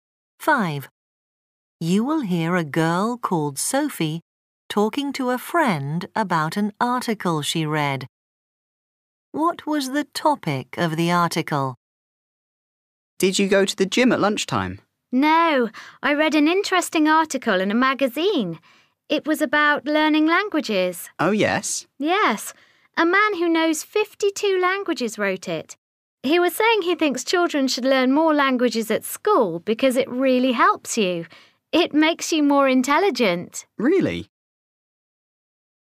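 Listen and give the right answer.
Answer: learning languages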